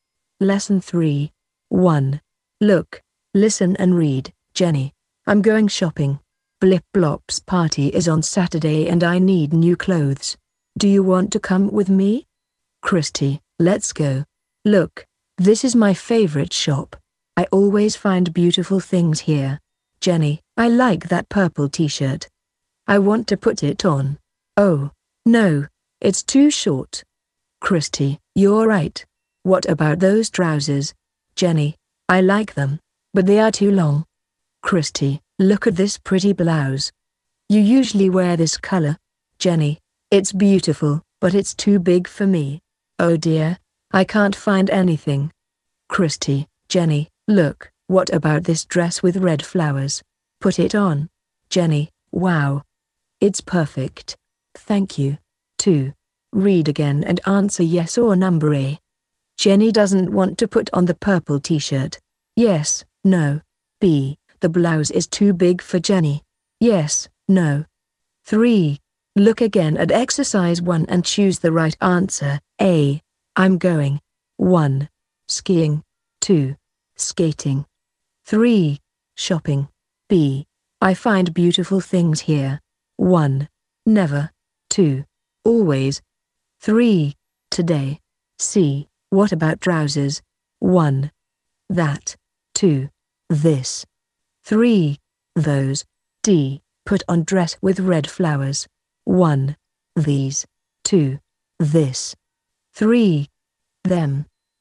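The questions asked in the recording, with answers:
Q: Jenny doesn't want to put on the purple t-shirt.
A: No

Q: The blouse is too big for Jenny.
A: Yes

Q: I'm going. 1. Skiing. 2. Skating. 3. Shopping.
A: 3: Shopping

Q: I find beautiful things here. 1. Never. 2. Always. 3. Today.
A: 2: Always

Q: What about trousers? 1. That. 2. This. 3. Those.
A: 3: Those

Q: Put on dress with red flowers. 1. These. 2. This. 3. Them.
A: 2: This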